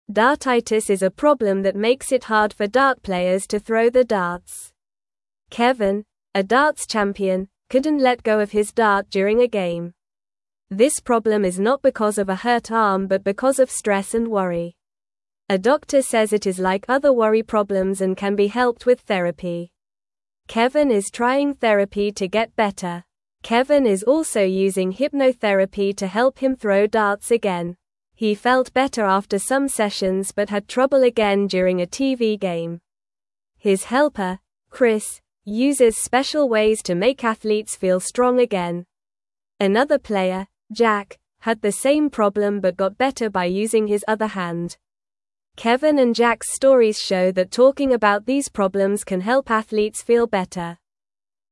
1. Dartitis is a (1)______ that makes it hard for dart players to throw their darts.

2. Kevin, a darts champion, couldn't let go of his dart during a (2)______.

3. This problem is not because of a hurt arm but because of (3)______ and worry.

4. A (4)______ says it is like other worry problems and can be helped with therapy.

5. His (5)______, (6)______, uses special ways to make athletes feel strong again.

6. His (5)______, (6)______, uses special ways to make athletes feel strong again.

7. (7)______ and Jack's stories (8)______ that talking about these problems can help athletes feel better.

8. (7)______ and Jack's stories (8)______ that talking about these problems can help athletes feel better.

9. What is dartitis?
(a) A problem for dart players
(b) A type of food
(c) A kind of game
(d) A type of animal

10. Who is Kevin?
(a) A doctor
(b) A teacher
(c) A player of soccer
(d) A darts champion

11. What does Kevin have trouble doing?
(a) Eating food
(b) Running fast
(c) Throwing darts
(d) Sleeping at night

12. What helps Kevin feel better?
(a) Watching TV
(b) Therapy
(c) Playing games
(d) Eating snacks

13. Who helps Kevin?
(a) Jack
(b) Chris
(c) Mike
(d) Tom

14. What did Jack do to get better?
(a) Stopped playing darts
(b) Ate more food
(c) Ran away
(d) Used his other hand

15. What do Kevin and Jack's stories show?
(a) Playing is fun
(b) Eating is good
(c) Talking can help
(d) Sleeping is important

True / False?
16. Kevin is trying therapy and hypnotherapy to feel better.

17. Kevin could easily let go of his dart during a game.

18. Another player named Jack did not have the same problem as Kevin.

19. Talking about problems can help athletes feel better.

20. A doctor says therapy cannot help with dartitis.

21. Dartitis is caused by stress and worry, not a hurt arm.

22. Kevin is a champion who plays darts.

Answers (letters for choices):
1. problem
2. game
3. stress
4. doctor
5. helper
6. Chris
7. Kevin
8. show
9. a
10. d
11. c
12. b
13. b
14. d
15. c
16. True
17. False
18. False
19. True
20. False
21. True
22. True

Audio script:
Dartitis is a problem that makes it hard for dart players to throw their darts. Kevin, a darts champion, couldn't let go of his dart during a game. This problem is not because of a hurt arm but because of stress and worry. A doctor says it is like other worry problems and can be helped with therapy. Kevin is trying therapy to get better.
Kevin is also using hypnotherapy to help him throw darts again. He felt better after some sessions but had trouble again during a TV game. His helper, Chris, uses special ways to make athletes feel strong again. Another player, Jack, had the same problem but got better by using his other hand. Kevin and Jack's stories show that talking about these problems can help athletes feel better.

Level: Level 1